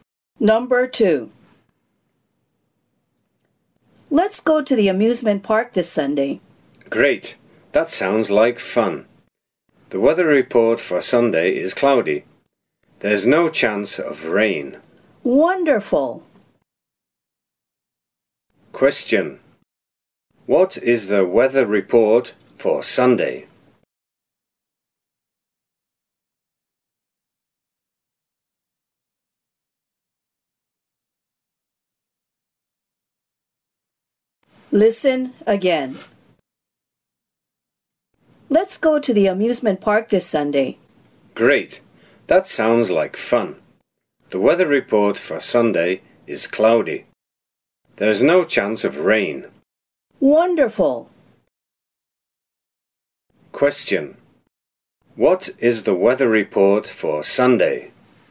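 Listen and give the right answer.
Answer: Cloudy, with no chance of rain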